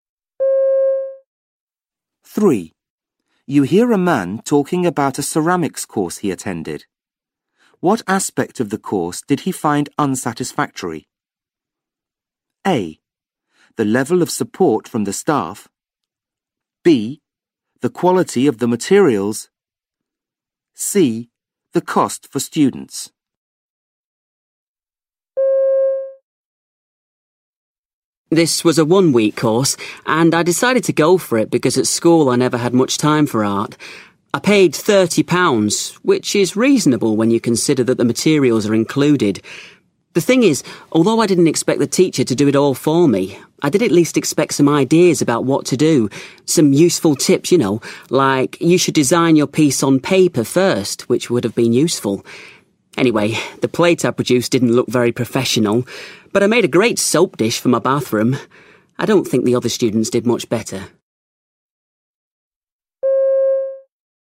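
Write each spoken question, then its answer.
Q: What aspect of the course did he find unsatisfactory?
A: A: The level of support from the staff.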